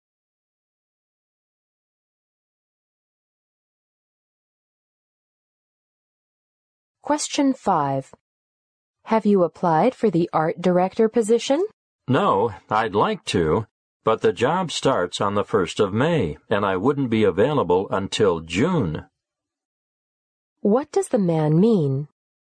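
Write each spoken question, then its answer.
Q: What does the man mean?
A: He won't apply because he won't be available until June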